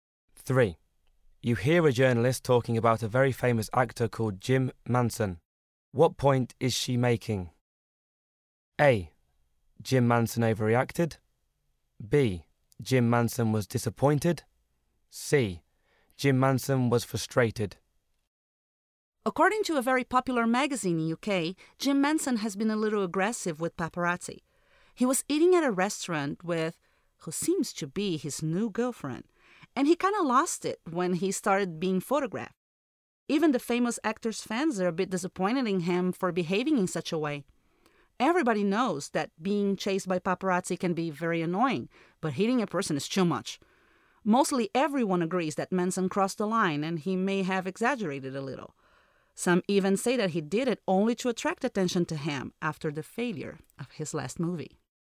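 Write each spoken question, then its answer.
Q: What point is she making?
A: A: Jim Manson overreacted.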